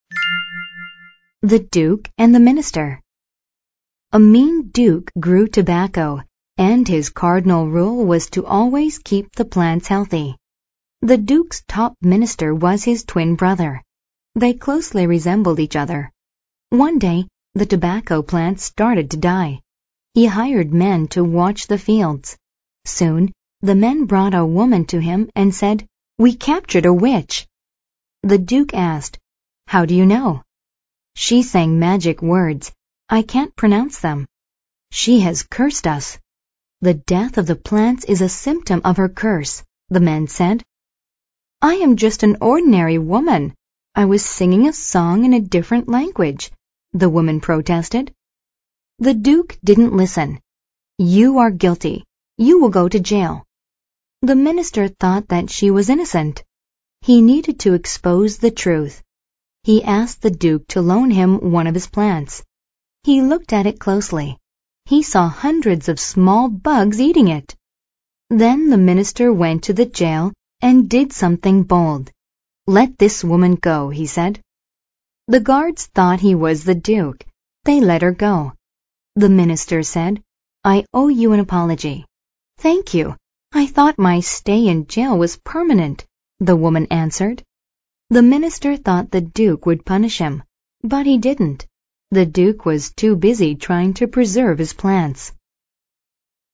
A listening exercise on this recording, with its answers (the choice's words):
Answer the questions.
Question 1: What is this story about?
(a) Why the duke was afraid of witches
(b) How a minister did what was right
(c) Why the duke loaned his brother a plant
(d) How a woman was captured and taken to jail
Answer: How a minister did what was right

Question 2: Why did the duke hire the men to watch the fields?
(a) They had a bold plan to preserve the tobacco.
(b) The tobacco plants were being destroyed.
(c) He needed them to expose the truth.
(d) He wanted permanent guards to watch the farmers.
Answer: The tobacco plants were being destroyed.

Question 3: Who or what was destroying the tobacco plants?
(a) An ordinary woman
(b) Little bugs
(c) A guilty witch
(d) The symptoms of disease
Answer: Little bugs

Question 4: According to the passage, all the following are true EXCEPT _________.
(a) the duke and the minister are twins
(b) the minister pretended to be the duke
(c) the duke gave an apology to the innocent woman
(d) the guard said the woman pronounced magic words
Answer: the duke gave an apology to the innocent woman

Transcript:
THE DUKE AND THE MINISTER
A mean duke grew tobacco, and his cardinal rule was to always keep the plants healthy. The duke's top minister was his twin brother. They closely resembled each other. One day, the tobacco plants started to die. He hired men to watch the fields. Soon, the men brought a woman to him and said, "We captured witch!"
The Duke asked, "How do you know?"
"She sang magic words. I can't pronounce them. She has cursed us. The death of the plants is a symptom of her curse," the men said.
"I am just an ordinary woman. I was singing a song in a different language," the woman protested.
The duke didn't listen. "You are guilty. You will go to jail."
The minister thought that she was innocent. He needed to expose the truth. He asked the duke to loan him one of his plants. He looked at it closely. He saw hundreds of small bugs eating it! Then the minister went to the jail and did something bold.
"Let this woman go," he said.
The guards thought he was the duke. They let her go. The minister said, "I owe you an apology."
"Thank you. I thought my stay in jail was permanent," the woman answered.
The minister thought the duke would punish him. But he didn't. The duke was too busy trying to preserve his plants.